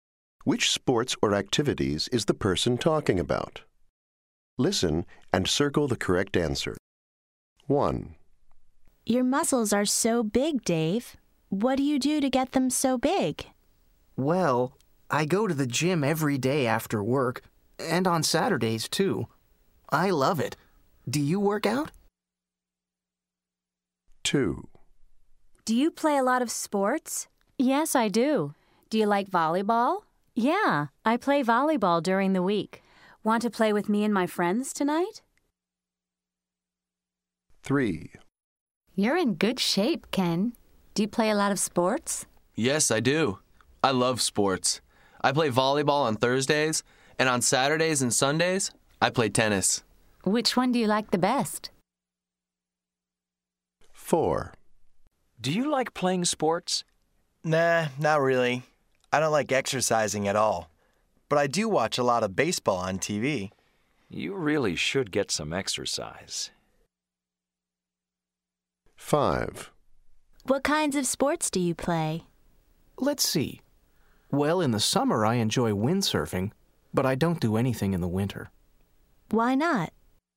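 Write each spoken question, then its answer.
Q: Which sports or activities is the person talking about?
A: Working out at the gym

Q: Which sports or activities is the person talking about?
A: Volleyball

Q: Which sports or activities is the person talking about?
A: Volleyball and tennis

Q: Which sports or activities is the person talking about?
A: Windsurfing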